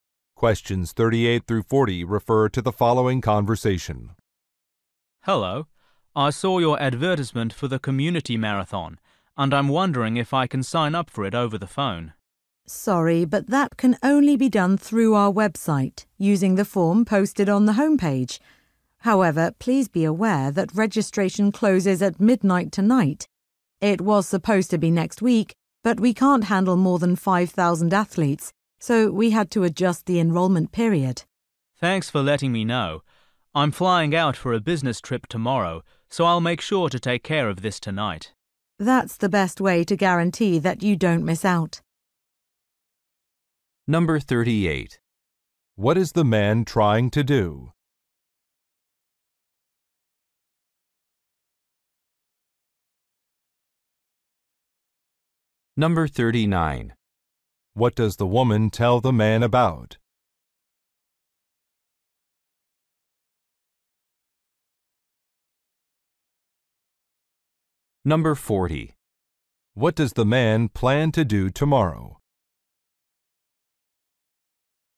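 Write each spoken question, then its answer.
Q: What is the man trying to do?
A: Sign up for the community marathon

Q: What does the woman tell the man about?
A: Registration closes tonight, earlier than planned

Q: What does the man plan to do tomorrow?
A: Fly out on a business trip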